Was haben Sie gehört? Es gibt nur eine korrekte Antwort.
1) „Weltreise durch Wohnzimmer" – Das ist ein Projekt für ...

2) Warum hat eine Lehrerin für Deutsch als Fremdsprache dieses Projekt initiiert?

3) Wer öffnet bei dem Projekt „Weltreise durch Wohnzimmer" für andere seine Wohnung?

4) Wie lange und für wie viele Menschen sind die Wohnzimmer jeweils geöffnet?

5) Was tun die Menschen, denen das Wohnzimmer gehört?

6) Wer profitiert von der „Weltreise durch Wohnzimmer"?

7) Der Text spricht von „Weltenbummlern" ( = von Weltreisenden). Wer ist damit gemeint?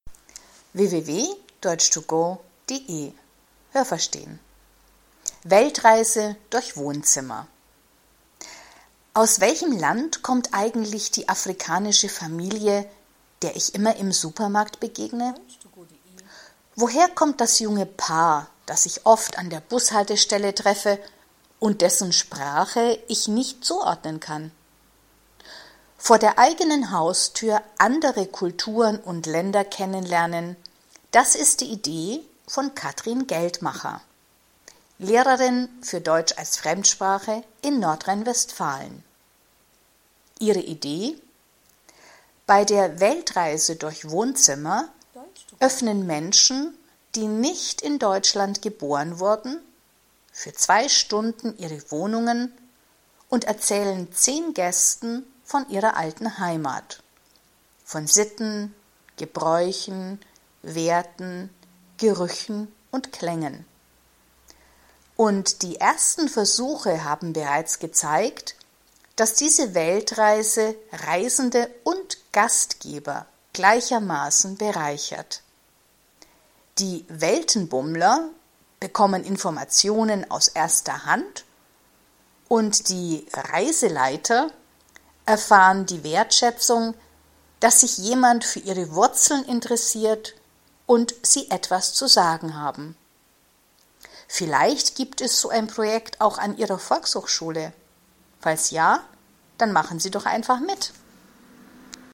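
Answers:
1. das Kennenlernen anderer Kulturen und Länder vor der eigenen Haustür
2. Damit man vor der eigenen Haustür andere Kulturen und Länder kennenlernt
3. Menschen, die nicht in Deutschland geboren wurden
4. 2 Stunden für 10 Gäste
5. Sie erzählen von ihrer alten Heimat, von Sitten, Gebräuchen, Werten, Gerüchen und Klängen
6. Reisende und Gastgeber gleichermaßen
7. Die Gäste, die die Wohnzimmer besuchen

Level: B (mittel)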